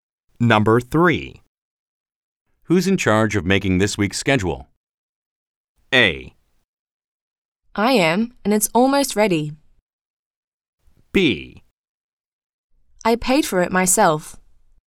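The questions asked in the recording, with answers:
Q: Who's in charge of making this week's schedule?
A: A: I am, and it's almost ready.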